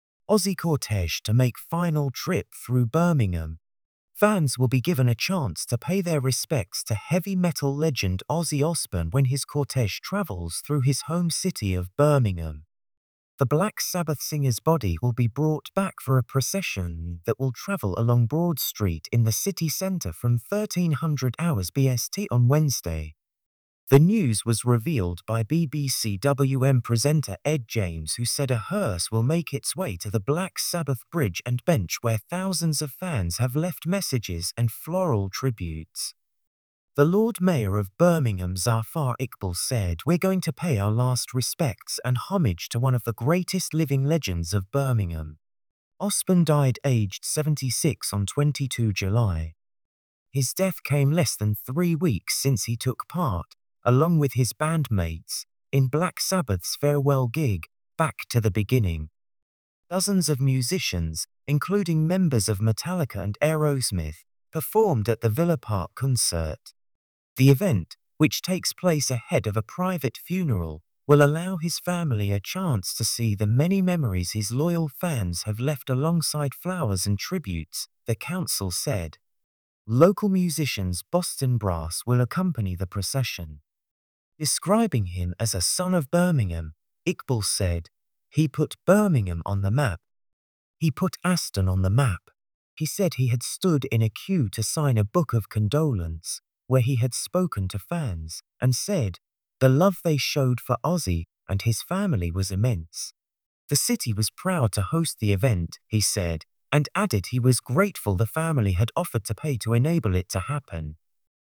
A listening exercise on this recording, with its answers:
Questions:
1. What is the purpose of Ozzy Osbourne's cortege travelling through Birmingham?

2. Where will the cortege travel through in Birmingham?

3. What will the cortege pass by during its journey?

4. Who will accompany the procession?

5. How did the Lord Mayor of Birmingham describe Ozzy Osbourne?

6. What event took place shortly before Ozzy Osbourne's death?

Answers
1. The purpose of the cortege is to allow fans to pay their respects to the heavy metal legend Ozzy Osbourne.
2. The cortege will travel along Broad Street in Birmingham city centre.
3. The cortege will pass by the Black Sabbath Bridge and bench, where fans have left messages and floral tributes.
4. The local musicians Bostin' Brass will accompany the procession.
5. The Lord Mayor described Ozzy Osbourne as "one of the greatest living legends of Birmingham" and a "son of Birmingham" who put the city and Aston on the map.
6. Black Sabbath's farewell gig, Back to the Beginning, took place less than three weeks before Ozzy Osbourne's death.

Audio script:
Ozzy cortege to make final trip through Birmingham
Fans will be given a chance to pay their respects to heavy metal legend Ozzy Osbourne when his cortege travels through his home city of Birmingham.
The Black Sabbath singer's body will be brought back for a procession that will travel along Broad Street in the city centre from 13:00 BST on Wednesday.
The news was revealed by BBC WM presenter Ed James who said a hearse will make its way to the Black Sabbath Bridge and bench where thousands of fans have left messages and floral tributes.
The Lord Mayor of Birmingham Zafar Iqbal said: "We're going to pay our last respects and homage to one of the greatest living legends of Birmingham." Osbourne died aged 76 on 22 July.
His death came less than three weeks since he took part, along with his band mates, in Black Sabbath's farewell gig, Back to the Beginning. Dozens of musicians, including members of Metallica and Aerosmith, performed at the Villa Park concert.
The event, which takes place ahead of a private funeral, will allow his family a chance to see the many memories his loyal fans have left alongside flowers and tributes, the council said.
Local musicians Bostin' Brass will accompany the procession.
Describing him as a "son of Birmingham", Iqbal said: "He put Birmingham on the map. He put Aston on the map."
The city was proud to host the event, he said, and added he was grateful the family had offered to pay to enable it to happen.
source: BBC